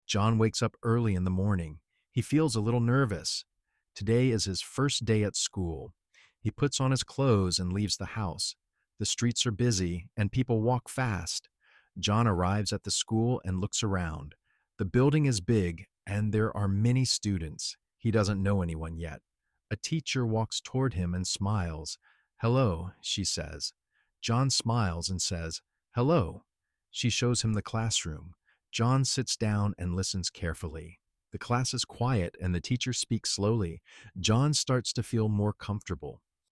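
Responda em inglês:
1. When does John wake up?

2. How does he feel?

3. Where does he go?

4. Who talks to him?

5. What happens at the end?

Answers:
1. Early in the morning.
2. A little nervous.
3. To school.
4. A teacher.
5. John starts to feel more comfortable.

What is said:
John wakes up early in the morning.
He feels a little nervous.
Today is his first day at school.
He puts on his clothes and leaves the house.
The streets are busy, and people walk fast.
John arrives at the school and looks around.
The building is big, and there are many students.
He doesn't know anyone yet.
A teacher walks toward him and smiles.
"Hello," she says.
John smiles and says, "Hello."
She shows him the classroom.
John sits down and listens carefully.
The class is quiet, and the teacher speaks slowly.
John starts to feel more comfortable.

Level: Inglês para Iniciantes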